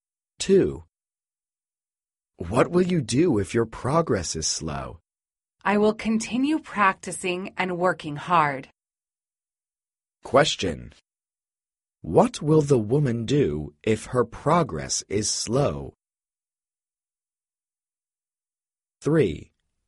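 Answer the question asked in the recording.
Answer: Continue practicing and working hard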